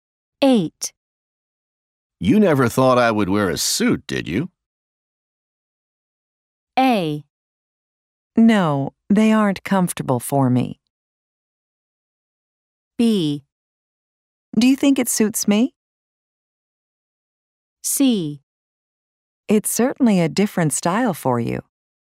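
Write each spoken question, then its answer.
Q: You never thought I would wear a suit, did you?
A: C: It's certainly a different style for you.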